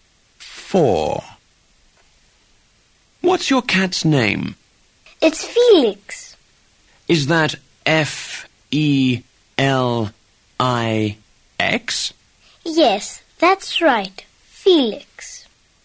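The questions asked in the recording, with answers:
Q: What's your cat's name?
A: Felix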